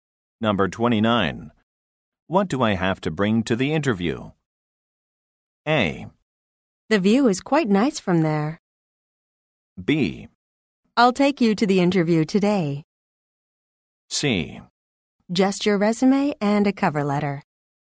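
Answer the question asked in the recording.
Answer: C: Just your resume and a cover letter.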